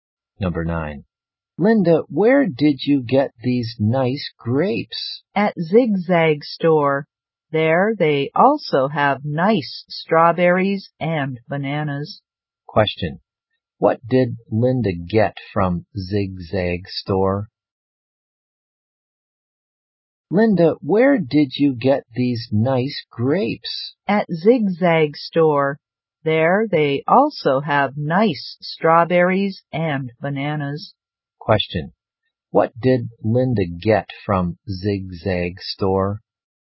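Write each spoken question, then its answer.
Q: What did Linda get from Zigzag Store?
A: Grapes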